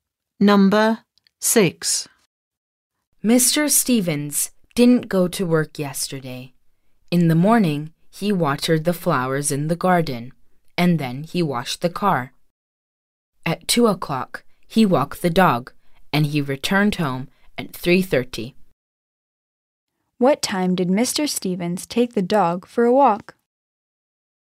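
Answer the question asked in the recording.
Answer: At 2 o'clock.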